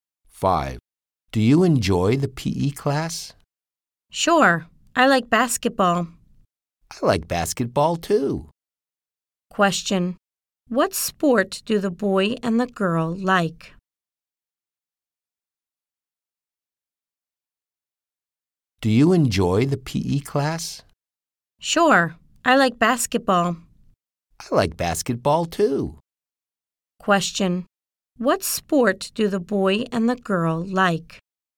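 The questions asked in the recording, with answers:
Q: Question. What sport do the boy and the girl like?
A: Basketball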